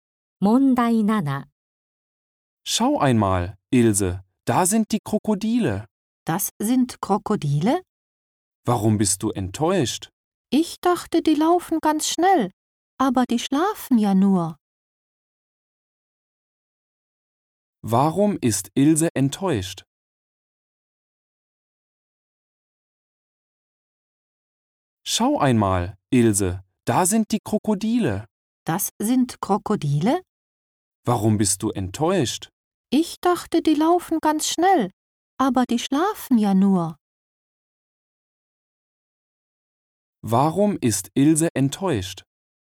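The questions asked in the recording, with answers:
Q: Warum ist Ilse enttäuscht?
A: Die Krokodile schlafen nur, statt schnell zu laufen.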